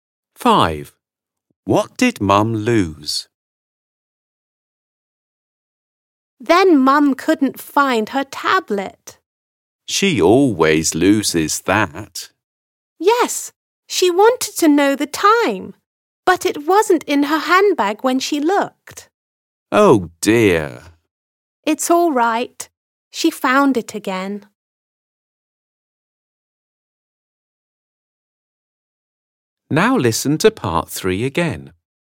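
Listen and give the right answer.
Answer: her tablet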